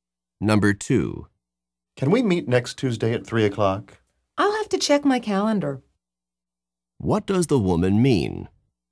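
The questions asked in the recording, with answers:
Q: What does the woman mean?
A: She needs to check whether she is free then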